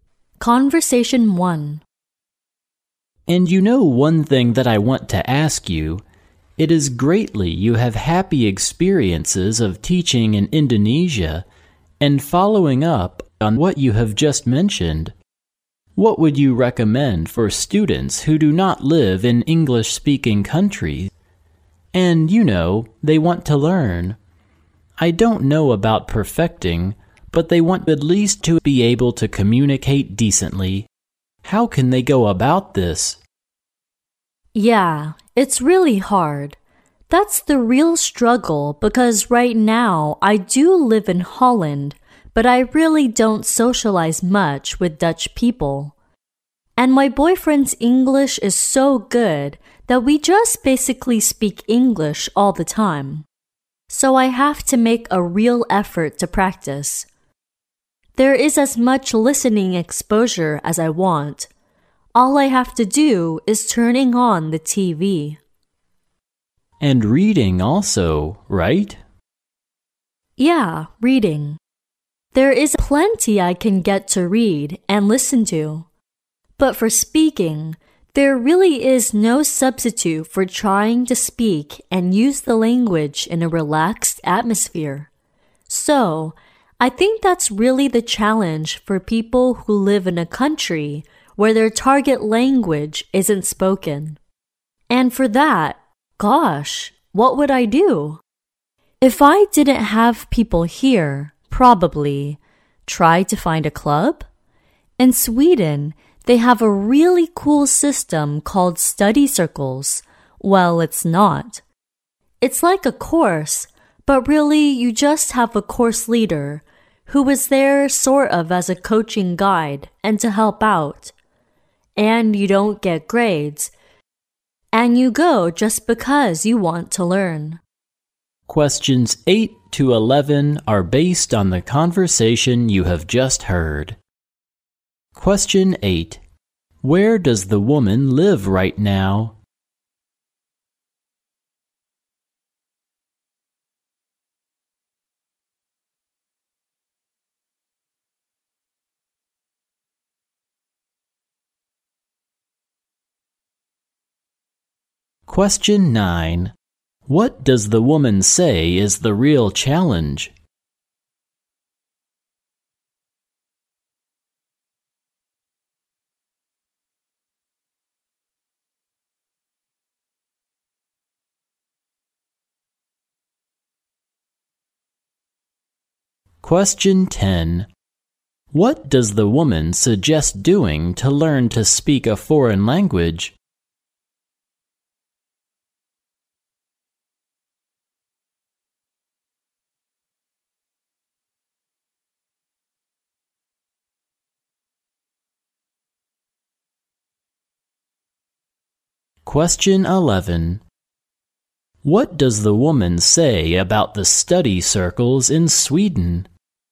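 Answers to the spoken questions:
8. In Holland
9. Practicing speaking in a country where the target language isn't spoken
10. Find a club
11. There are no grades; people join just because they want to learn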